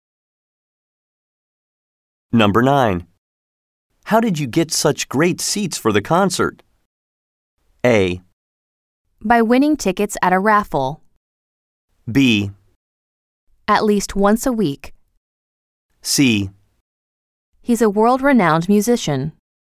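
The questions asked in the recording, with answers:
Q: How did you get such great seats for the concert?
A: A: By winning tickets at a raffle.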